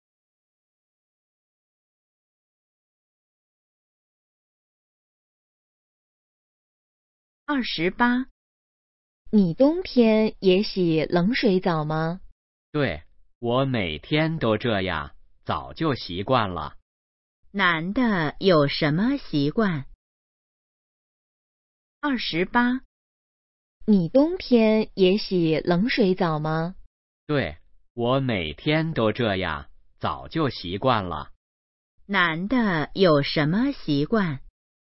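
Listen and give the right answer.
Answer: 冬天也洗冷水澡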